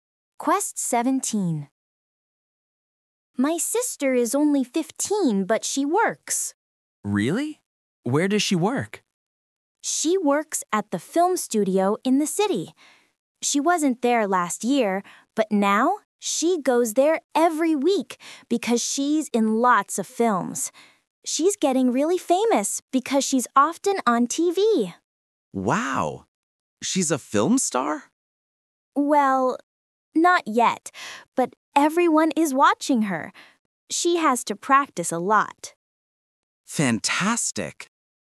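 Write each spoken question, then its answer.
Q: Where does she work?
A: At the film studio in the city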